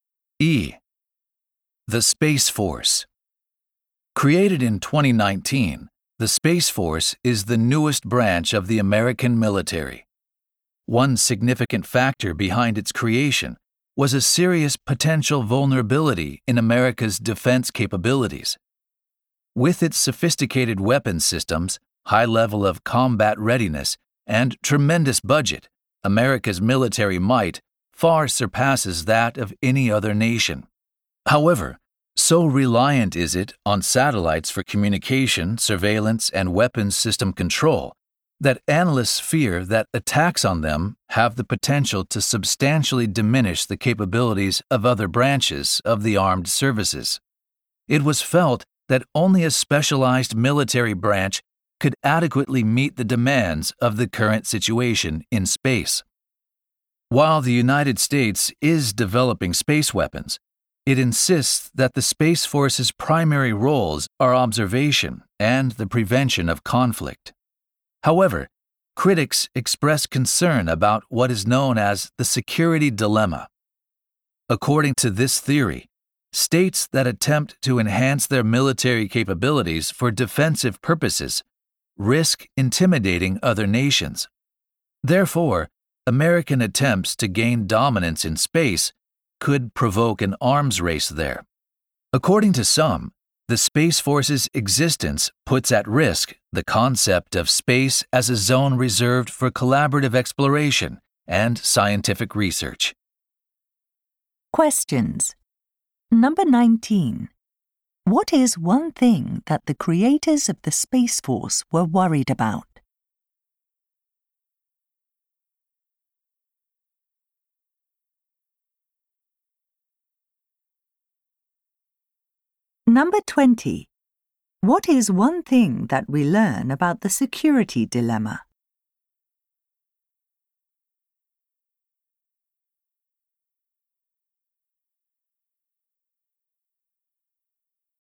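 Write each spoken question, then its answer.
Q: What is one thing that the creators of the Space Force were worried about?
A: Attacks on the military's satellites could seriously weaken its capabilities.

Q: What is one thing that we learn about the security dilemma?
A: Building up military strength for defense can intimidate other nations and provoke an arms race.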